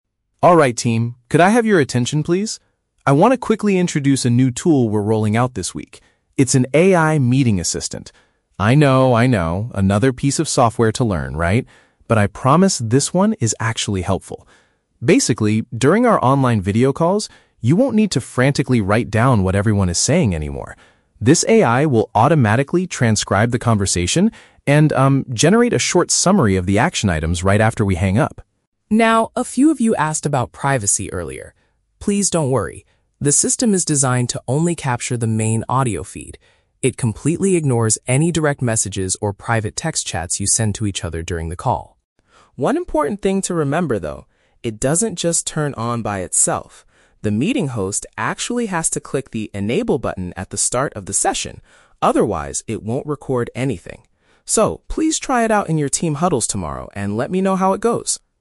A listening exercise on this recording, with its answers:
Listen to a project manager talking to his team and choose the correct answer (A, B, or C) for each question.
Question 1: What is the primary function of the new software?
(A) To schedule upcoming video calls for the team.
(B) To create a written record of spoken discussions.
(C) To monitor the employees' private text messages.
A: (B) To create a written record of spoken discussions.

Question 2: What does the manager say about direct messages during a meeting?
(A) They are included in the final action item summary.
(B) They are entirely disregarded by the AI system.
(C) They are only visible to the project manager.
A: (B) They are entirely disregarded by the AI system.

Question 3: What must happen for the AI tool to start working?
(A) The organizer must manually activate the feature.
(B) It will begin functioning automatically when a call starts.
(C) Everyone in the meeting must agree to the privacy terms.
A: (A) The organizer must manually activate the feature.

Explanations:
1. The manager says the AI will "transcribe the conversation and... generate a short summary." "Create a written record" is a paraphrase of this capability. Why the trap is wrong: Option (C) is a trap. The manager mentions "private text chats," but explicitly states that the AI "completely ignores" them, rather than monitoring them. Option (A) is a plausible office software feature, but it is not mentioned.
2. The speaker states that the system "completely ignores" direct messages. "Entirely disregarded" is a direct synonym for "completely ignores." Why the trap is wrong: Option (A) is the trap. The AI generates a "summary of the action items," but this is based on the audio feed, not the text messages. Option (C) is a plausible privacy concern, but it is never mentioned in the audio.
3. The manager explains that "the meeting host actually has to click the 'enable' button." This means the organizer has to activate it manually. Why the trap is wrong: Option (B) is the trap. The manager specifically warns that the tool "doesn't just turn on by itself," which means it does not start automatically. Option (C) is a plausible real-world requirement for recording, but it is not stated in the monologue.

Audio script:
Project Manager: Alright, team, could I have your attention, please? I want to quickly introduce a new tool we're rolling out this week. It's an AI meeting assistant. I know, I know, another piece of software to learn, right? But I promise this one is actually helpful. Basically, during our online video calls, you won't need to frantically write down what everyone is saying anymore. This AI will automatically transcribe the conversation and, um, generate a short summary of the action items right after we hang up.
Now, a few of you asked about privacy earlier. Please don't worry. The system is designed to only capture the main audio feed. It completely ignores any direct messages or private text chats you send to each other during the call.
One important thing to remember, though... it doesn't just turn on by itself. The meeting host actually has to click the 'enable' button at the start of the session, otherwise, it won't record anything. So, please try it out in your team huddles tomorrow and let me know how it goes.

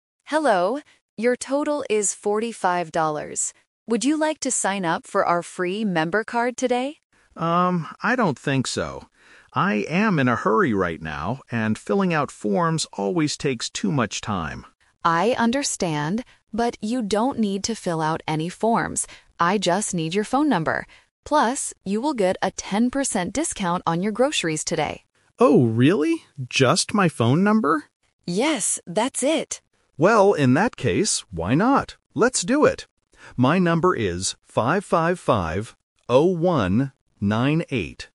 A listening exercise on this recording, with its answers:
Listen to the conversation and choose the correct answer (A, B, or C).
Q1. What does the cashier ask the customer to do?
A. Sign up for a member card.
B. Pay with a credit card.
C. Fill out a long form.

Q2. Why does the customer refuse the offer at first?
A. Because the card is too expensive.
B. Because he is in a hurry.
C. Because he already has a card.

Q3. What does the customer need to provide to get the card?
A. His email address.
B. A completed form.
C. His phone number.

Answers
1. A. Sign up for a member card.
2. B. Because he is in a hurry.
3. C. His phone number.

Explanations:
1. The cashier clearly asks, "Would you like to sign up for our free member card today?" Option B is a plausible supermarket action but is not mentioned. Option C is the Trap; the cashier says he doesn't need to fill out forms.
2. The customer says, "I am in a hurry right now..." (in a hurry = not having much time). Option A is a Trap because the cashier specifically says the card is "free". Option C is not mentioned.
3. This detail causes the Twist. The cashier says, "I just need your phone number," and the customer agrees because it is fast. Option B is the Trap (filling out forms is what the customer wanted to avoid). Option A is a plausible requirement but is not mentioned in the audio.

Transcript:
Would you like to sign up for our free member card today?
Customer: Um, I don't think so. I am in a hurry right now, and filling out forms always takes too much time.
Cashier: I understand, but you don't need to fill out any forms. I just need your phone number. Plus, you will get a ten percent discount on your groceries today.
Customer: Oh, really? Just my phone number?
Cashier: Yes, that's it!
Customer: Well, in that case, why not? Let's do it. My number is 555-0198.

